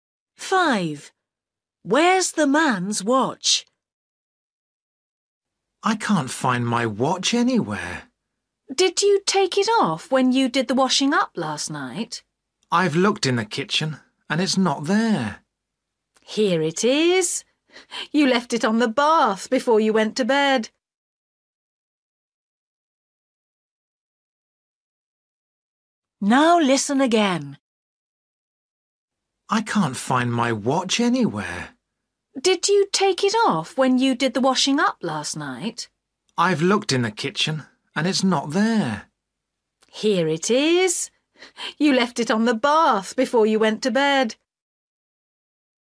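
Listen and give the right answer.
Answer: On the bath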